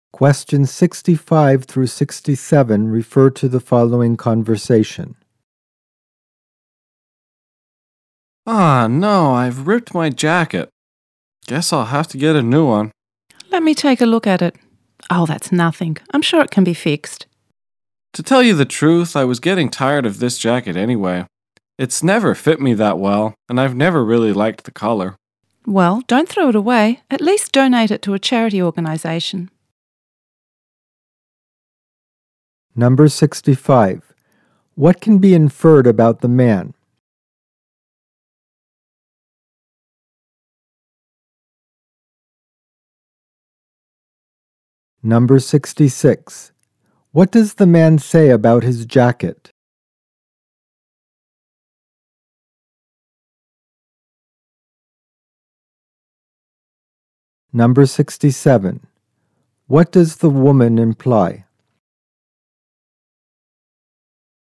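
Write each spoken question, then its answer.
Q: What can be inferred about the man?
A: He ripped his jacket and wants to get a new one.

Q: What does the man say about his jacket?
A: It never fit him well and he never liked the color.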